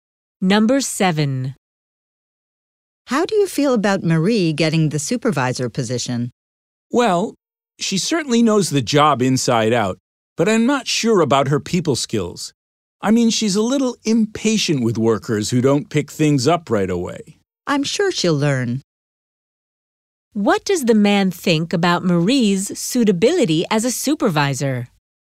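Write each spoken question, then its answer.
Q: What does the man think about Marie's suitability as a supervisor?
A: She knows the job inside out, but her people skills are doubtful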